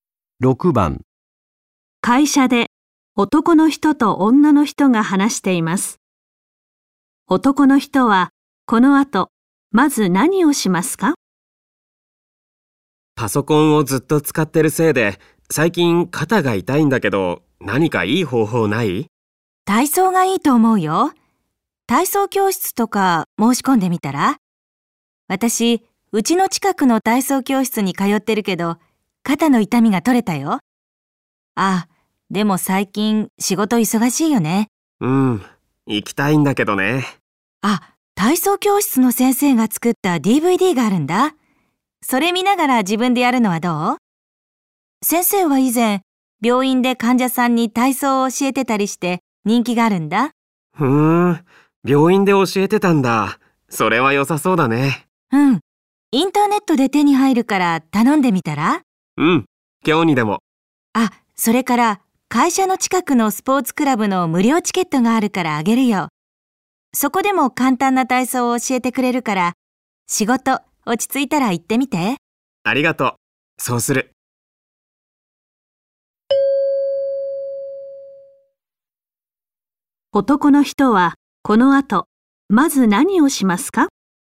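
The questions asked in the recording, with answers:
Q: 男の人はこの後、まず何をしますか?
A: インターネットで体操のDVDを注文する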